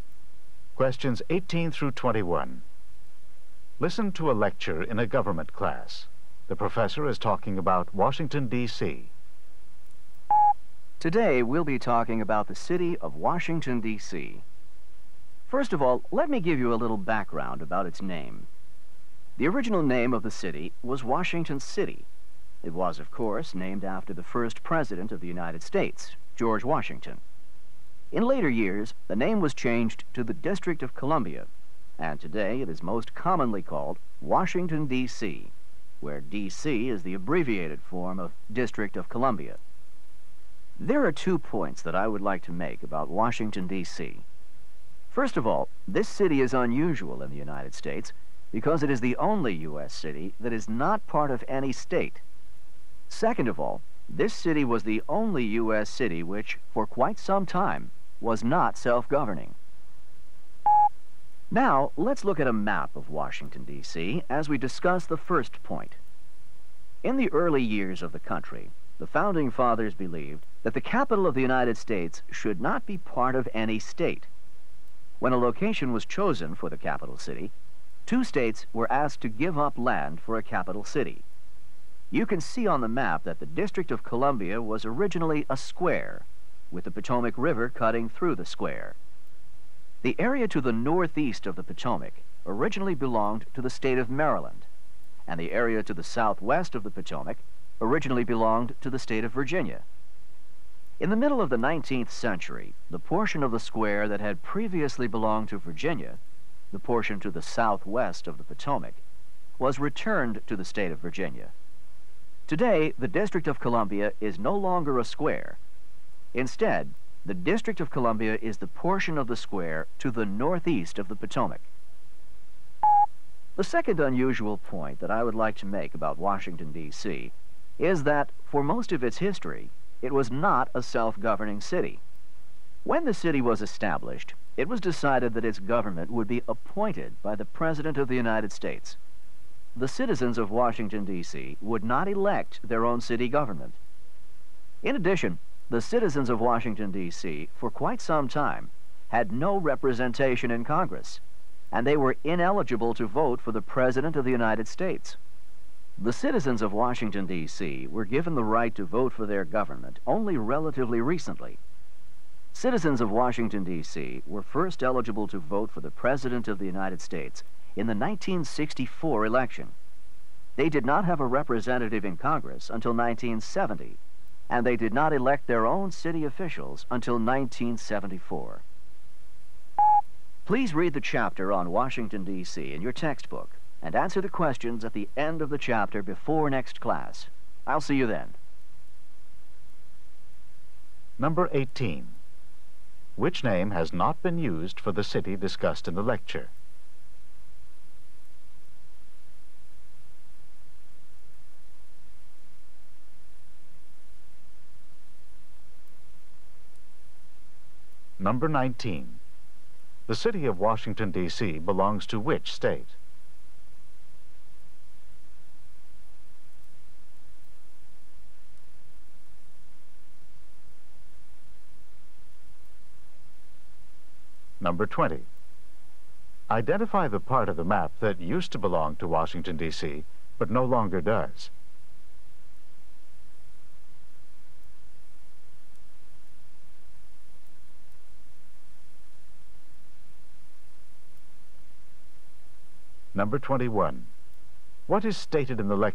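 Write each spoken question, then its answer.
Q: The city of Washington, D.C. belongs to which state?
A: None; it is not part of any state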